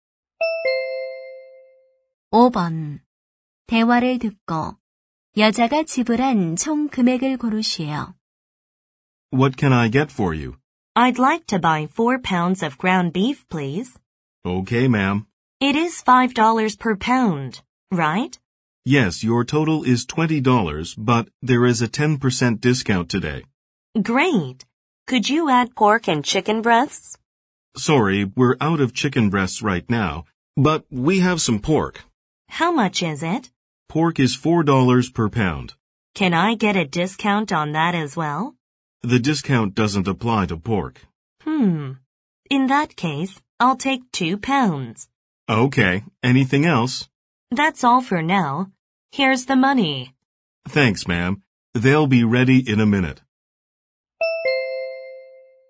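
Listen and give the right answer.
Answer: $26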